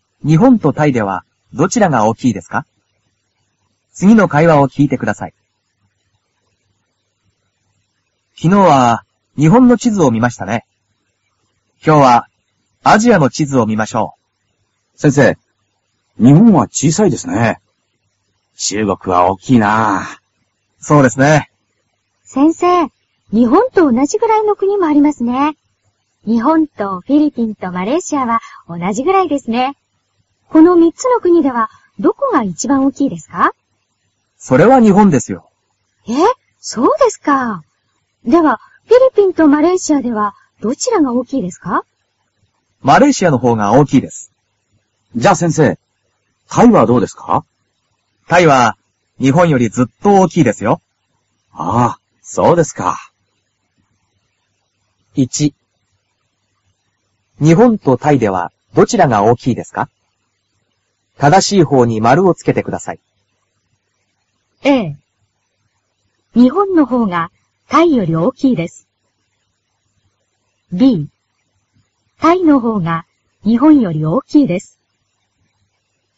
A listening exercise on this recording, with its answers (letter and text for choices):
日本とタイではどちらが大きいですか。正しいほうに〇をつけてください。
日本とタイではどちらが大きいですか。正しいほうに〇をつけてください。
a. 日本のほうがタイより大きいです。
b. タイのほうが日本より大きいです。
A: b. タイのほうが日本より大きいです。

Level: cơ bản